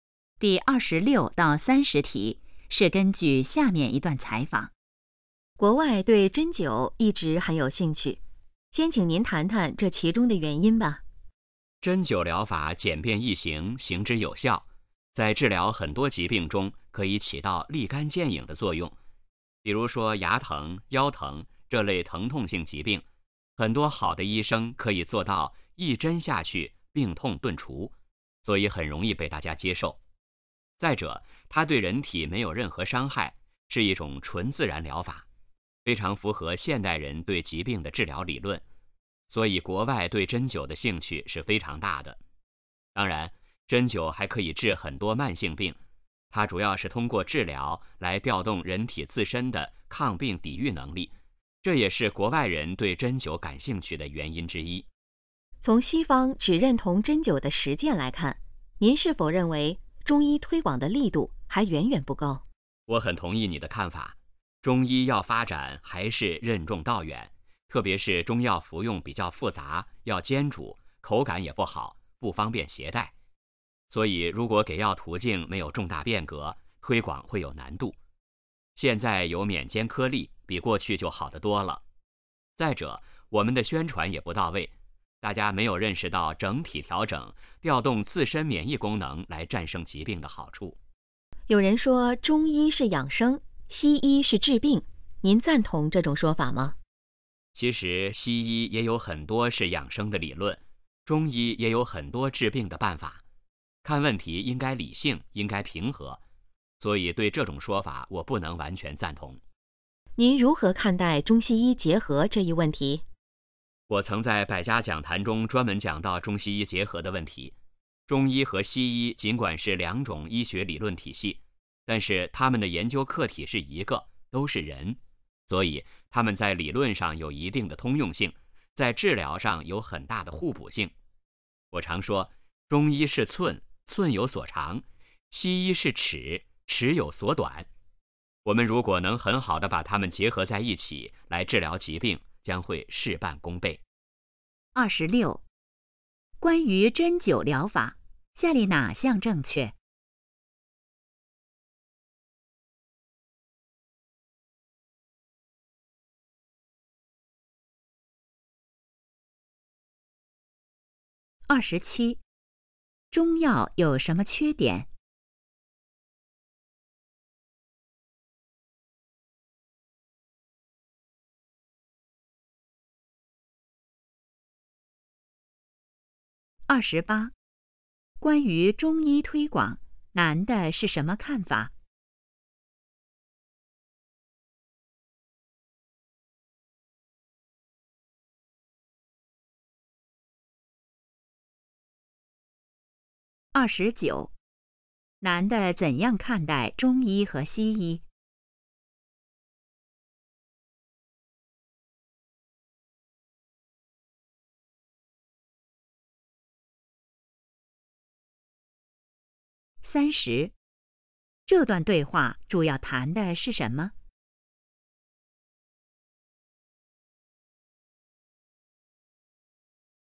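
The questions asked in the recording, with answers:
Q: 中药有什么缺点?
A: 服用复杂,要煎煮,口感不好,不方便携带

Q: 关于中医推广,男的是什么看法?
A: 推广力度还不够,任重道远

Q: 男的怎样看待中医和西医?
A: 有通用性和互补性,应结合起来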